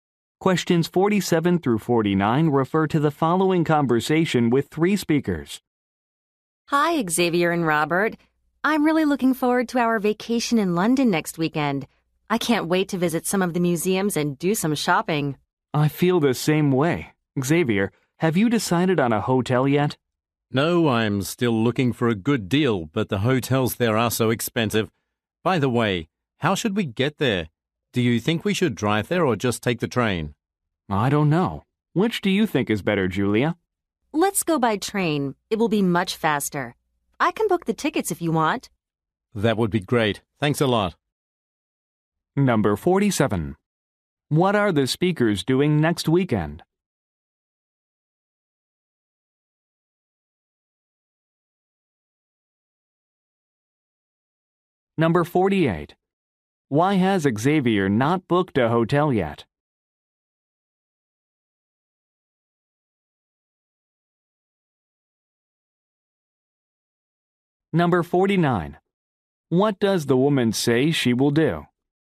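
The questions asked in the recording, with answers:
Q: What are the speakers doing next weekend?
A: Going on vacation in London

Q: Why has Xavier not booked a hotel yet?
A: Hotels there are expensive

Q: What does the woman say she will do?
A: Book the train tickets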